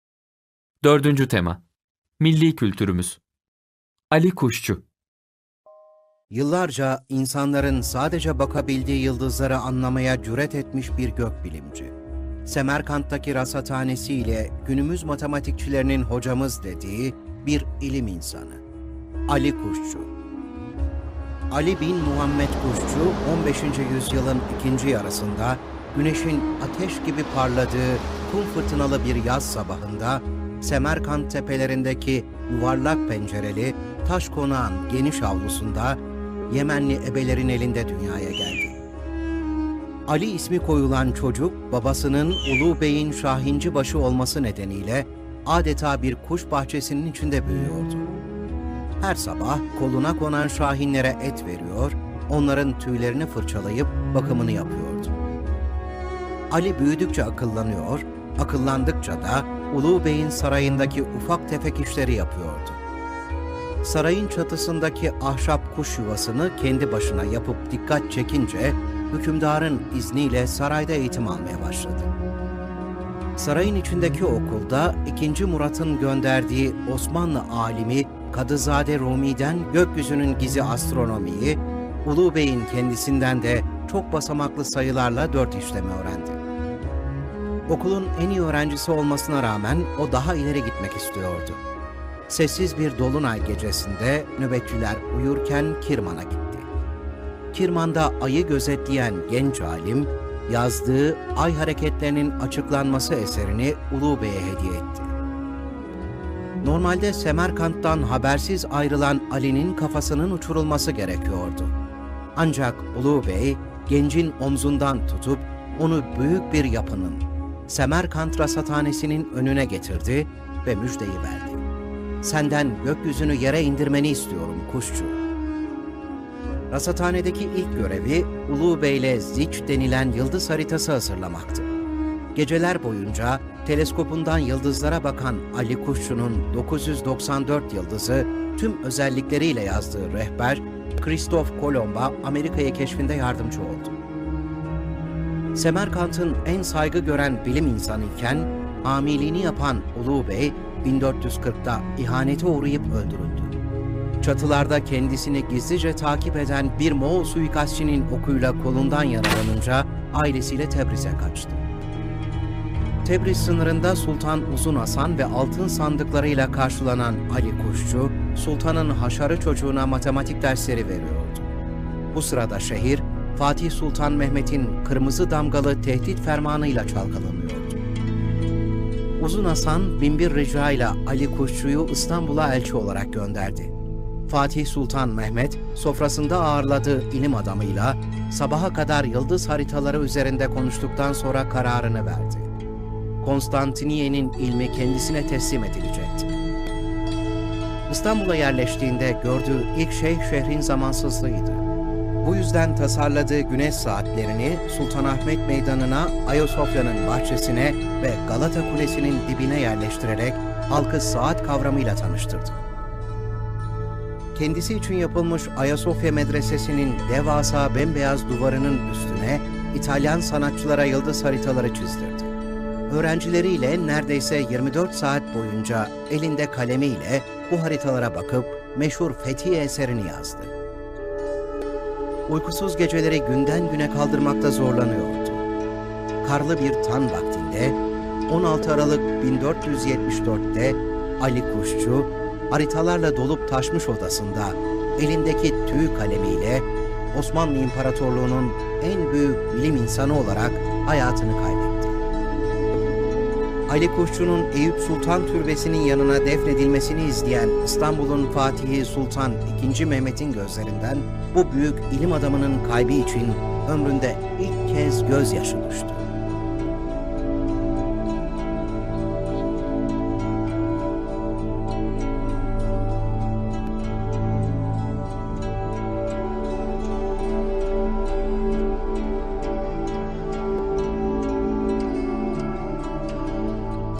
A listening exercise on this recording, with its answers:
Aşağıdaki sorulan izlediğiniz çizgi filmden hareketle cevaplayınız.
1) Ali Kuşçu, nasıl bir ortamda büyümüştür?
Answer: Adeta bir kuş bahçesinde büyümüştür.

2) Ali Kuşçu'nun sarayda eğitim almasını sağlayan olay nedir?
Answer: Sarayın çatısındaki ahşap kuş yuvasını kendi başına yapmasıyla eğitim almaya başlamıştır.

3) Ali Kuşçu, Kirman şehrinde ne yapmıştır?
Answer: Kirman'da Ay'ı gözlemlemiştir.

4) Ali Kuşçu'nun Tebriz şehrine kaçmasına neden olan olay nedir?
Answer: Çatılarda kendisini takip eden bir Moğol suikastçının okuyla kolundan yaralanınca kaçmıştır.

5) Ali Kuşçu'nun rasathanedeki ilk görevi nedir?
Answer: Uluğ Bey ile yıldız haritası hazırlamak ilk göreviydi.

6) Sultan Uzun Haşan, Ali Kuşçu'yu neden İstanbul'a göndermiştir?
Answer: Ali Kuşçu'yu İstanbul'a elçi olarak göndermiştir.

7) Fatih Sultan Mehmet, Ali Kuşçu'dan ne istemiştir?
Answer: Ali Kuşçu'dan İstanbul'a yerleşmesini ve ilmiyle yol göstermesini istemiştir.

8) Ali Kuşçu, İstanbul'da hangi eksikliği görmüştür? Bu eksikliği gidermek için ne yapmıştır?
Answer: İstanbul'da zaman eksikliği görmüştür.

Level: 5. Sınıf